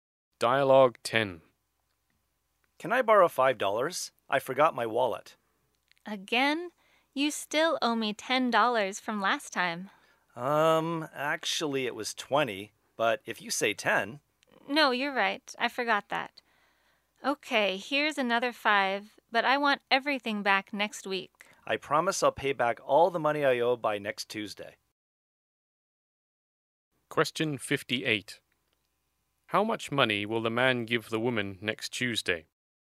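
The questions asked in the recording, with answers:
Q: How much money will the man give the woman next Tuesday?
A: $25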